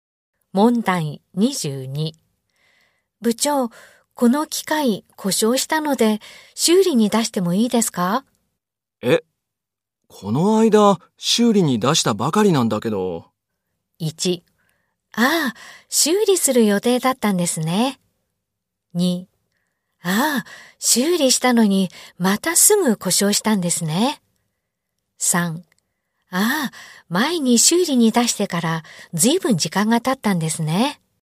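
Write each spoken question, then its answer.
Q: 部長、この機械故障したので修理に出してもいいですか?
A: 2: ああ、修理したのにまたすぐ故障したんですね。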